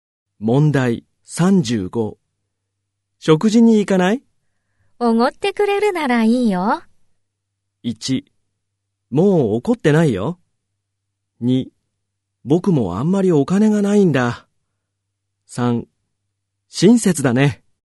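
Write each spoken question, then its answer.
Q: おごってくれるならいいよ。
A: 2: 僕もあんまりお金がないんだ。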